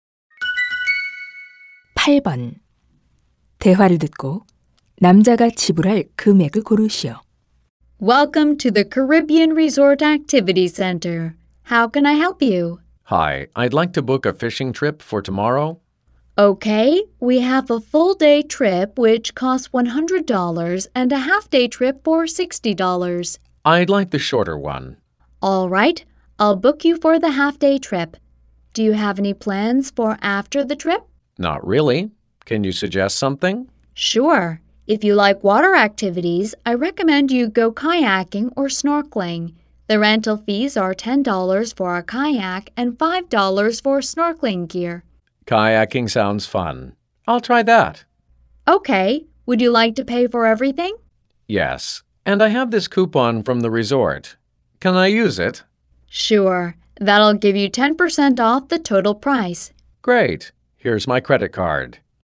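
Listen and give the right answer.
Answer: $63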